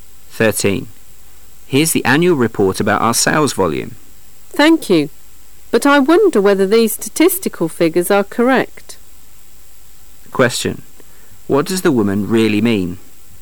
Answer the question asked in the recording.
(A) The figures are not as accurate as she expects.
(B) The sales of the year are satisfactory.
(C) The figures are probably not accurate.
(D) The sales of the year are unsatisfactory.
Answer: (C) The figures are probably not accurate.

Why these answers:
M:Here's the annual report about our sales volume. W:Thank you! But I wonder whether these statistical figures are correct. Q:What does the woman really mean?